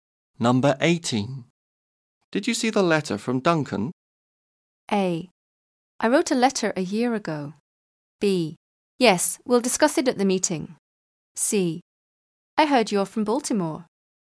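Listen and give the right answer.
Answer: B: Yes, we'll discuss it at the meeting.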